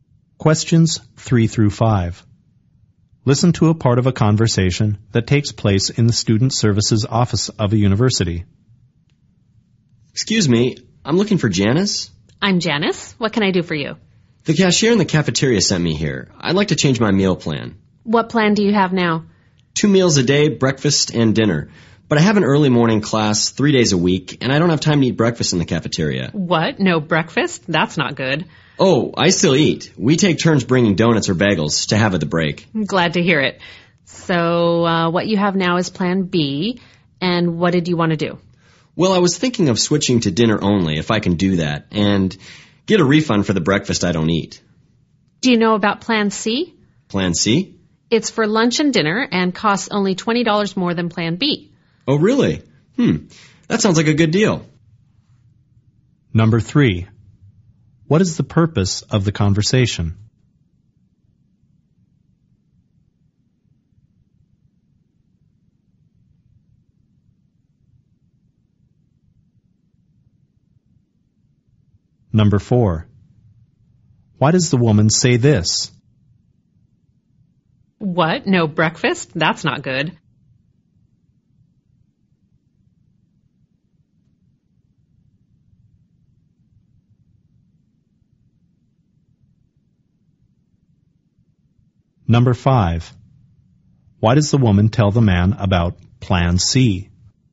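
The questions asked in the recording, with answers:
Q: What is the purpose of the conversation?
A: To change his meal plan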